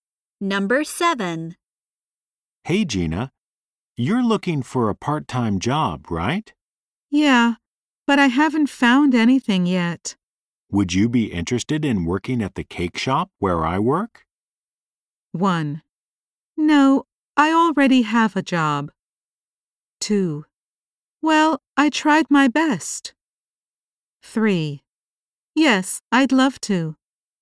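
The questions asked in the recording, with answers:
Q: Would you be interested in working at the cake shop where I work?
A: 3: Yes, I'd love to.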